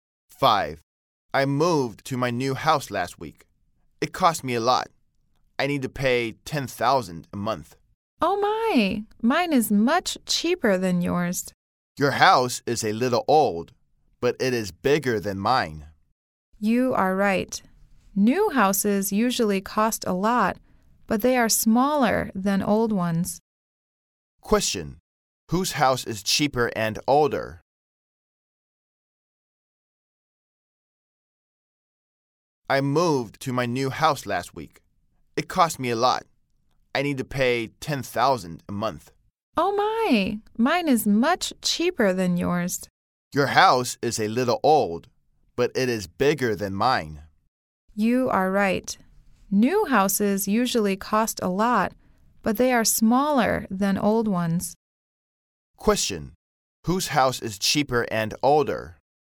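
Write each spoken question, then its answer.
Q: Whose house is cheaper and older?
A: The second speaker's house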